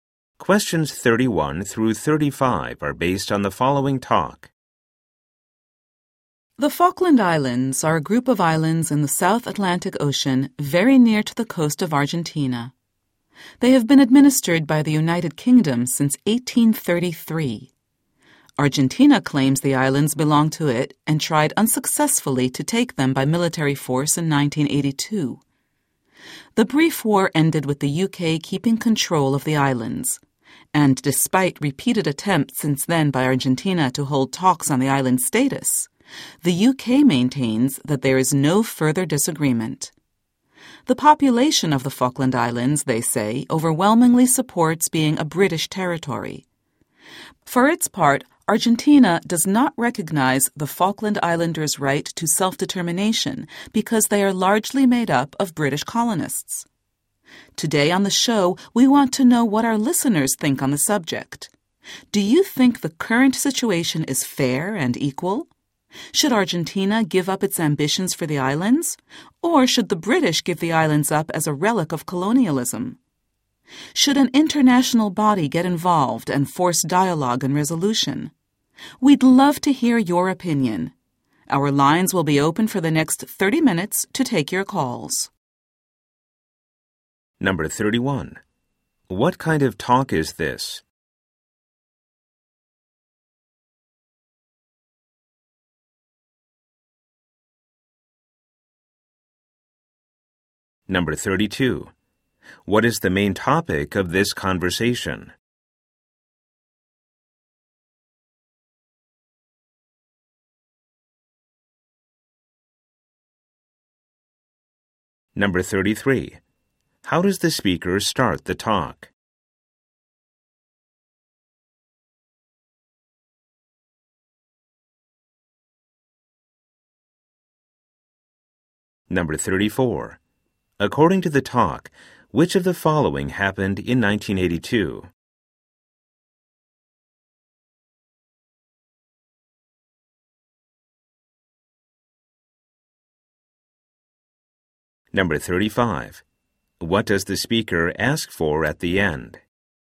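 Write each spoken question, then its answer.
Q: What kind of talk is this?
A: A radio call-in show

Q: What is the main topic of this conversation?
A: The status of the Falkland Islands

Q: According to the talk, which of the following happened in 1982?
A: Argentina tried to take the islands by military force

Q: What does the speaker ask for at the end?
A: Listeners' opinions by phone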